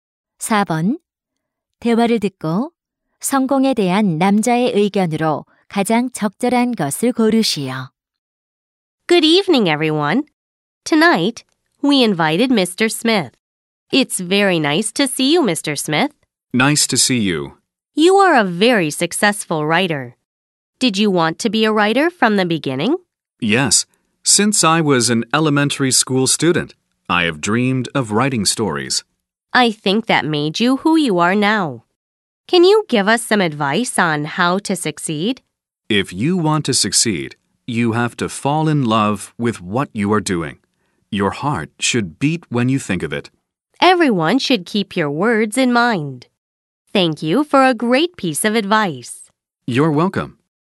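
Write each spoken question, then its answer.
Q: 대화를 듣고 성공에 대한 남자의 의견으로 가장 적절한 것을 고르시오.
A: 성공하려면 자신이 하는 일을 사랑해야 한다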